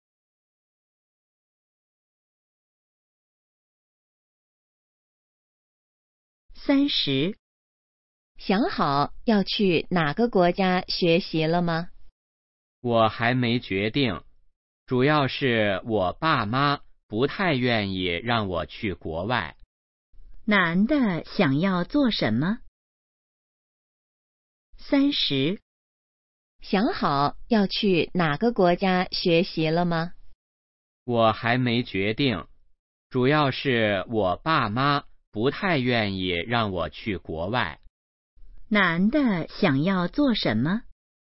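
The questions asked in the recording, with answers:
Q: 男的想要做什么?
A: 去国外学习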